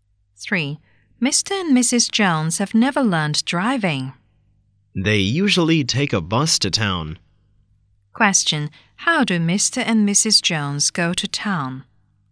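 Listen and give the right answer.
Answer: By bus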